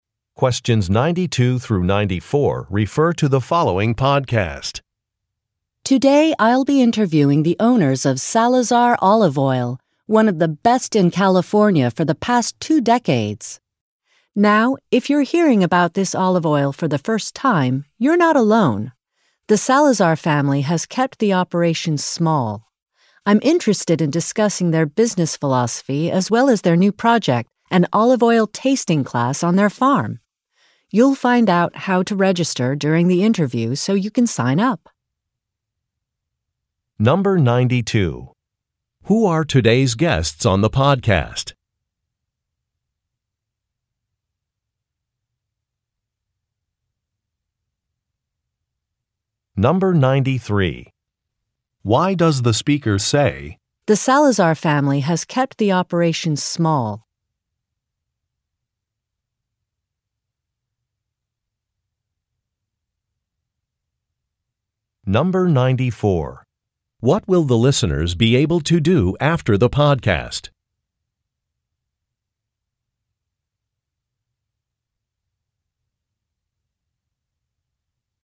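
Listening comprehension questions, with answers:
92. Who are today's guests on the podcast?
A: The owners of an olive oil business

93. Why does the speaker say, "The Salazar family has kept the operation small"?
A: To explain why many people have not heard of the company

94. What will the listeners be able to do after the podcast?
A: Register for an olive oil tasting class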